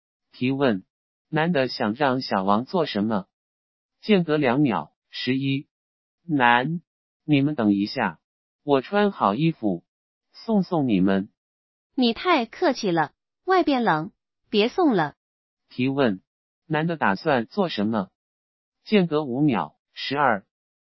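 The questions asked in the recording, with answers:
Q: 提问,男的打算做什么?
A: 送他们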